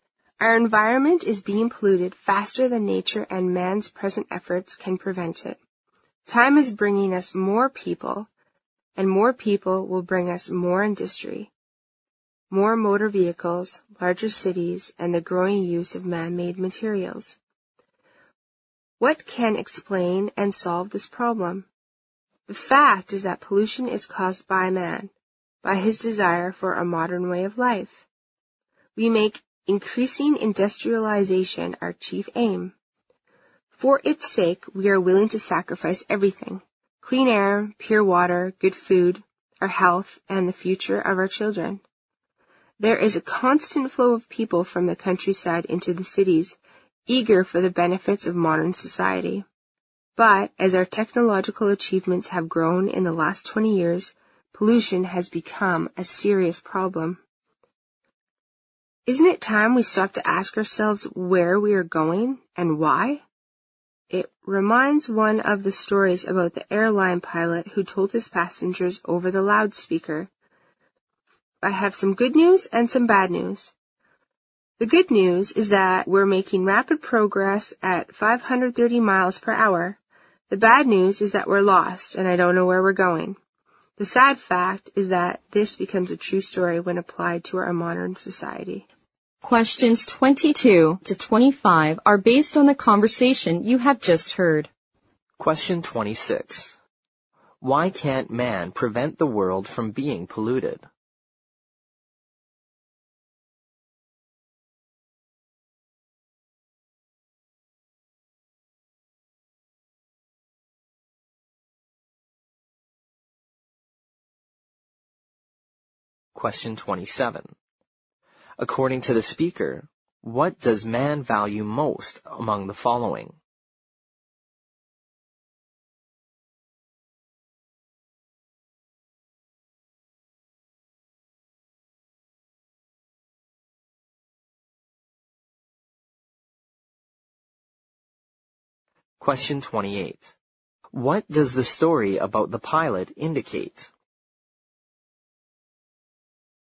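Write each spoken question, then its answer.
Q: According to the speaker, what does man value most among the following?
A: Increasing industrialization

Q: What does the story about the pilot indicate?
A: Modern society is progressing rapidly without knowing where it is going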